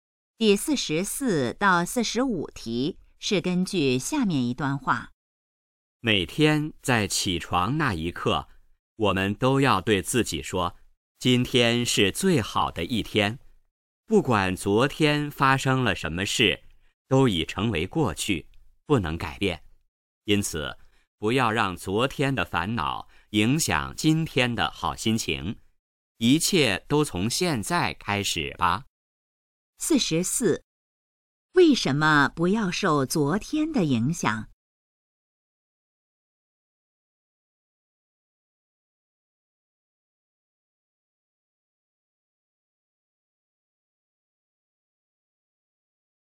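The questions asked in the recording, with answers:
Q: 为什么不要受昨天的影响?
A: 昨天已成为过去,不能改变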